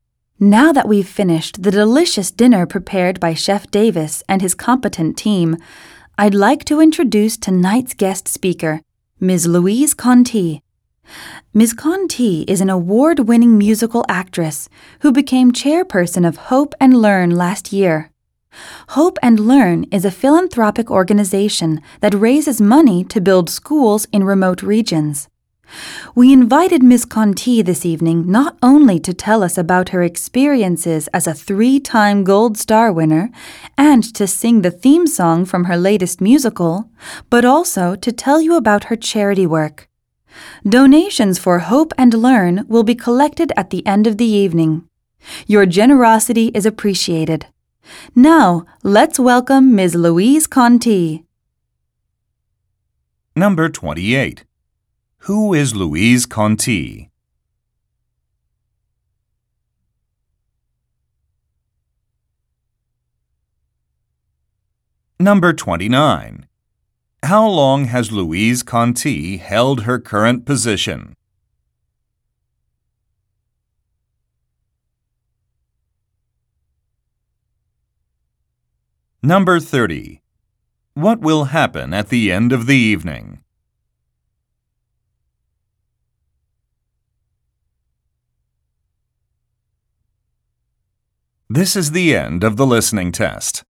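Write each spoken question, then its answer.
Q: Who is Louise Conti?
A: An award-winning musical actress and chairperson of Hope and Learn

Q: How long has Louise Conti held her current position?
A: Since last year (about one year)

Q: What will happen at the end of the evening?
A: Donations for Hope and Learn will be collected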